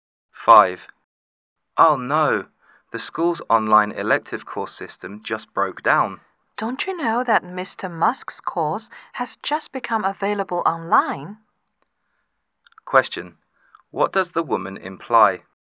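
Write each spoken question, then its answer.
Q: What does the woman imply?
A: The system broke down because so many students were trying to sign up for Mr. Musk's course.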